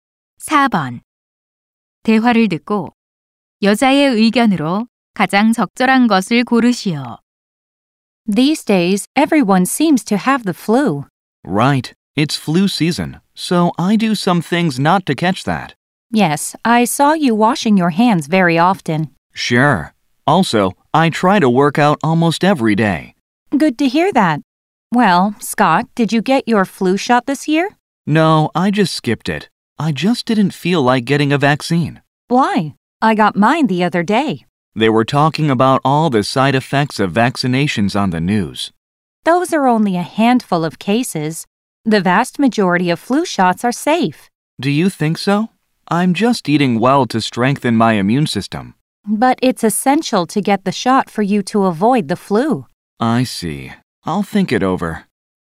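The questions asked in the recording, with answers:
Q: 대화를 듣고 여자의 의견으로 가장 적절한 것을 고르시오.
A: 독감 예방을 위해 예방 주사를 맞아야 한다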